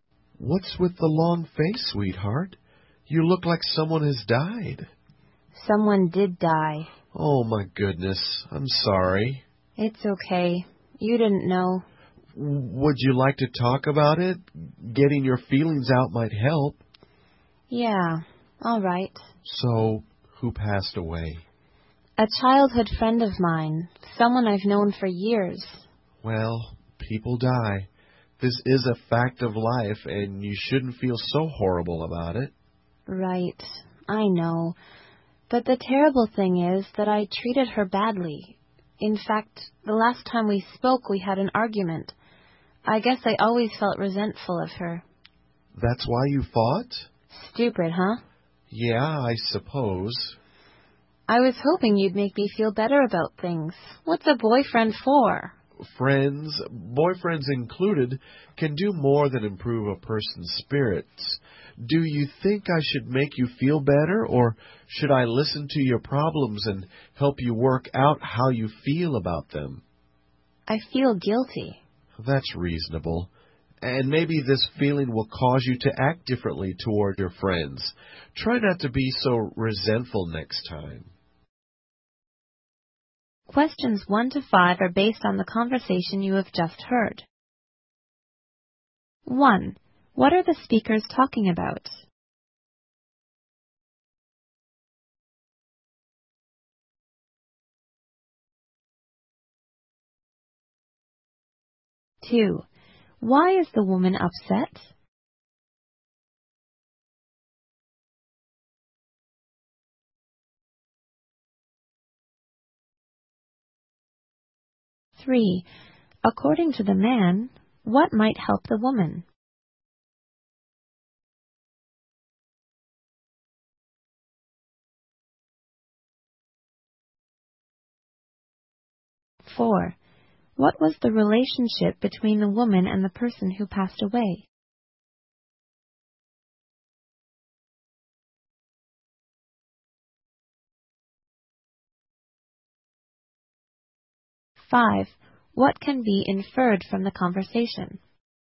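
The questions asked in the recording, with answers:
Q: What are the speakers talking about?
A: The death of the woman's childhood friend

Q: Why is the woman upset?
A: Her friend died and she had treated her badly

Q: According to the man, what might help the woman?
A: Getting her feelings out by talking

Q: What was the relationship between the woman and the person who passed away?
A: Childhood friends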